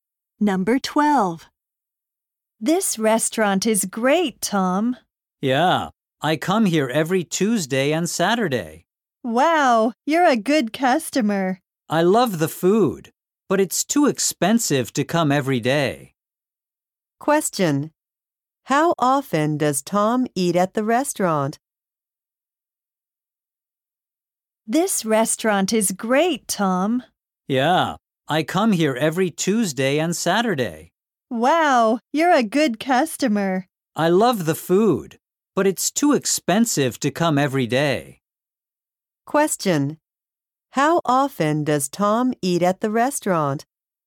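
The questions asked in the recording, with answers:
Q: How often does Tom eat at the restaurant?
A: Twice a week (Tuesdays and Saturdays).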